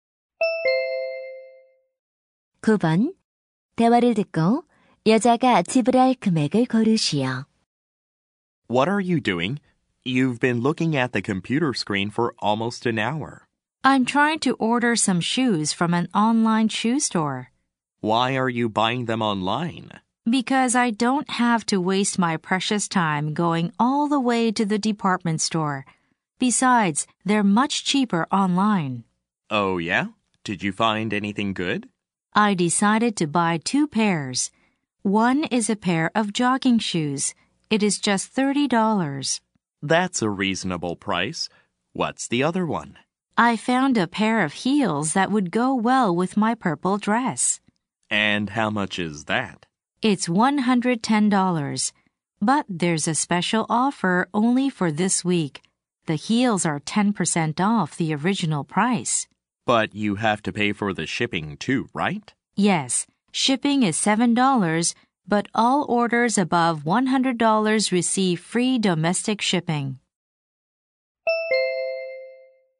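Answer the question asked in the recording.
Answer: $129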